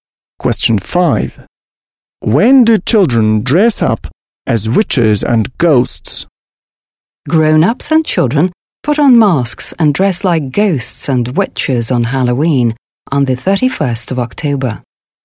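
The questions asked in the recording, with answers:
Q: When do children dress up as witches and ghosts?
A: On Halloween, the 31st of October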